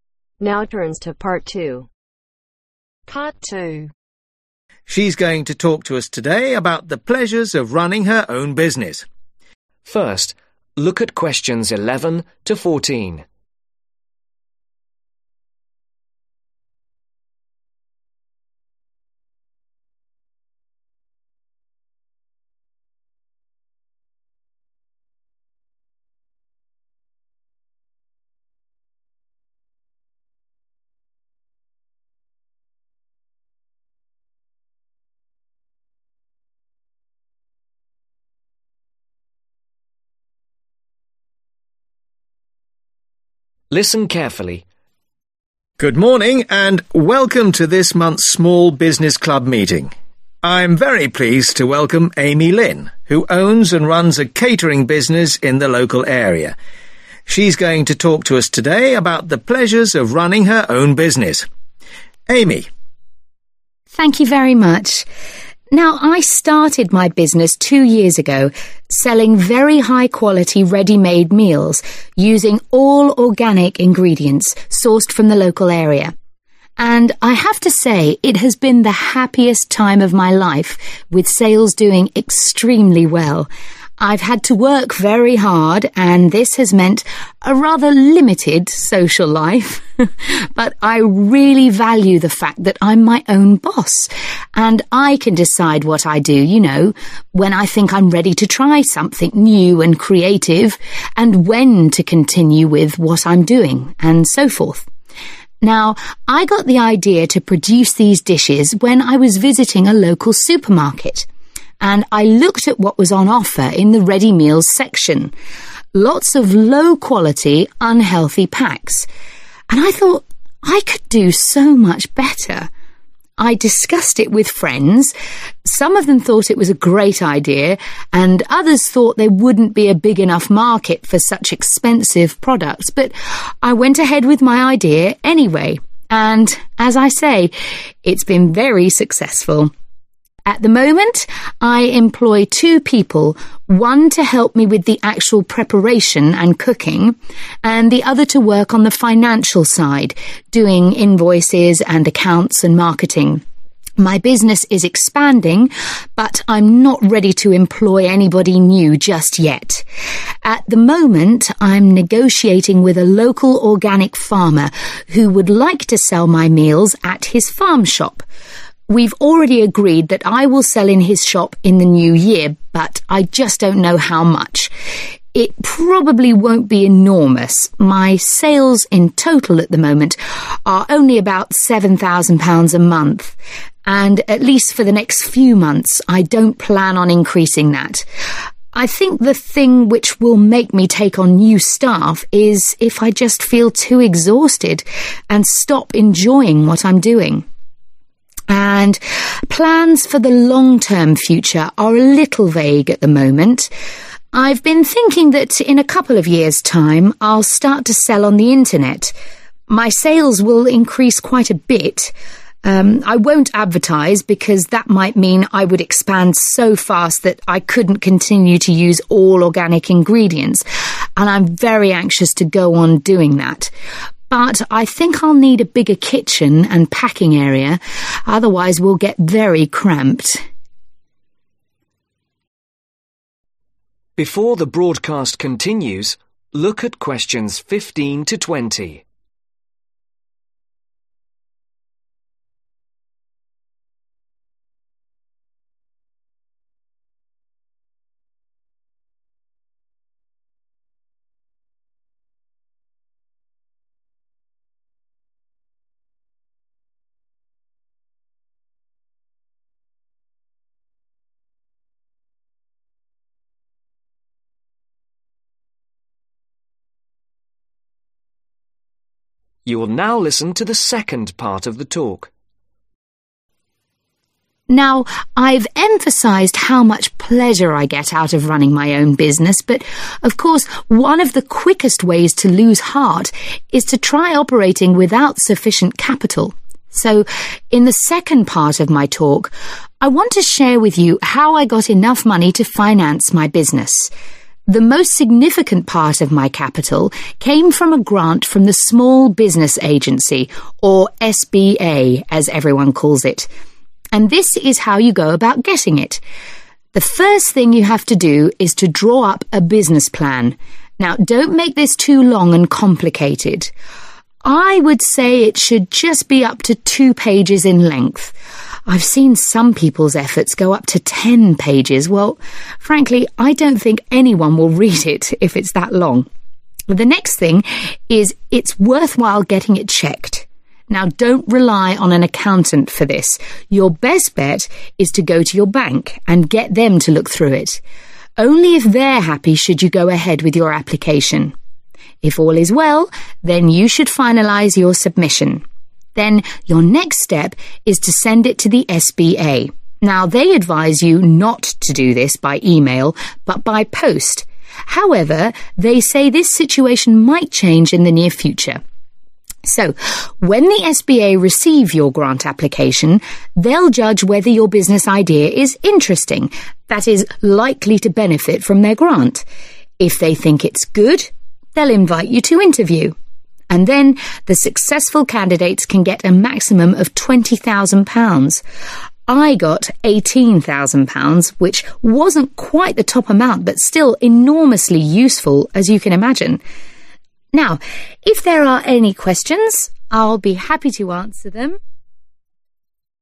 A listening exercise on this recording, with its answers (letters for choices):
Choose the correct letter , A , B or C.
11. What does Amy enjoy most about her work ?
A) the social contact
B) the freedom of choice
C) the creative aspects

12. Why did Amy start her business ?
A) a supermarket asked her to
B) she was inspired by a friend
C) she felt existing products were poor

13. Amy will take on more staff if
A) she decides to sell at a local farm shop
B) her income reaches more than £ 7,000 a month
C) she gets too tired to do so much work.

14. If Amy decides to sell on the internet , she will have to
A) expand her work premises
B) do more advertising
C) use different ingredients.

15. Devise a business (15) .................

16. (Maximum (16) ............... pages)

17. Ask a (17) .............. to check it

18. Send it to SBA by (18)..............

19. Go to (19) ...............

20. Receive up to (20) £ ..............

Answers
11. B
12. C
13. C
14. A
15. PLAN
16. 2
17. BANK
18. POST or MAIL
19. INTERVIEW
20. 20,000